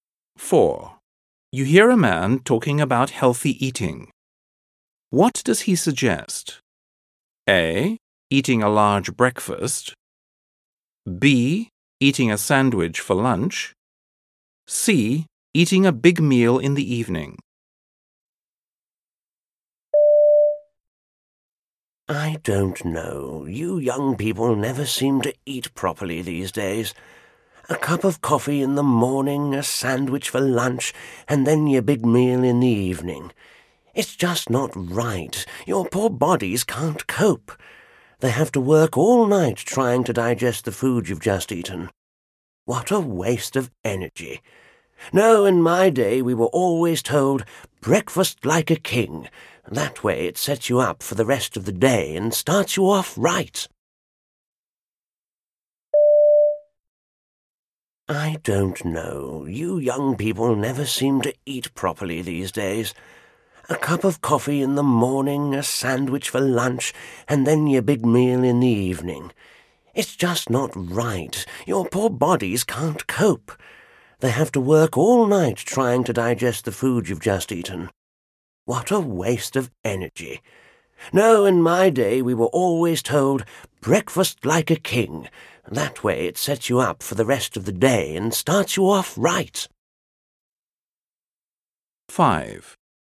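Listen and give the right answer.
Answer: A: Eating a large breakfast.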